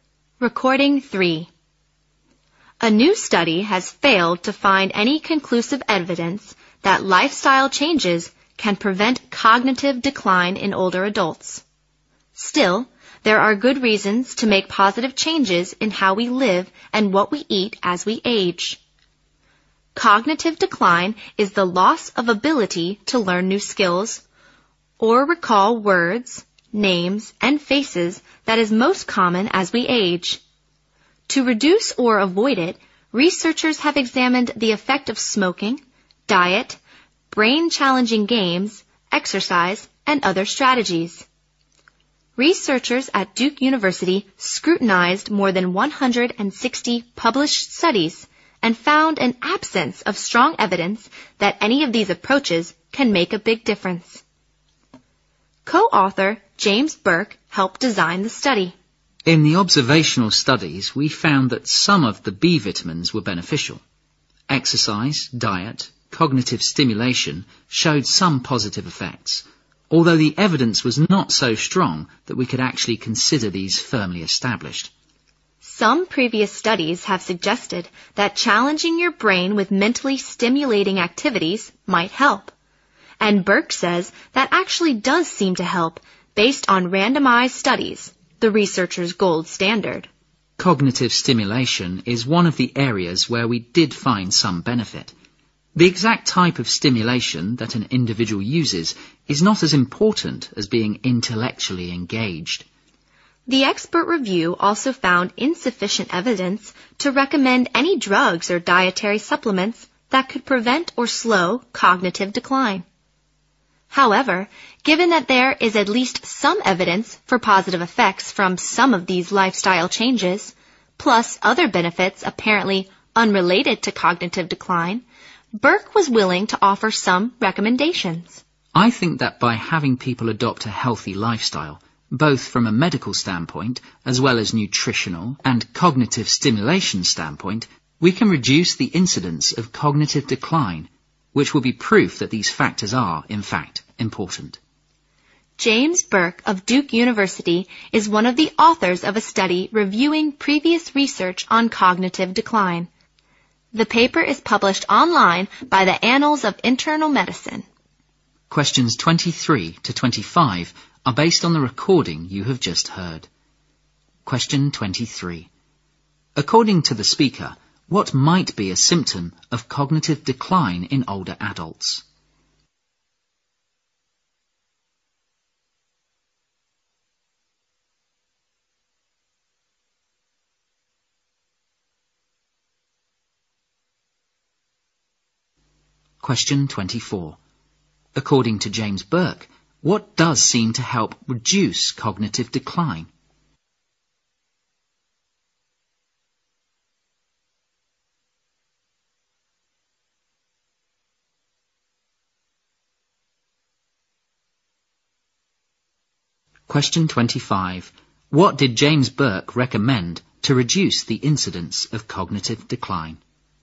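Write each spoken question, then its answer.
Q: According to the speaker, what might be a symptom of cognitive decline in older adults?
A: Inability to recall words, names and faces

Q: According to James Burke, what does seem to help reduce cognitive decline?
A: Cognitive stimulation (being intellectually engaged)

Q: What did James Burke recommend to reduce the incidence of cognitive decline?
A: Adopting a healthy lifestyle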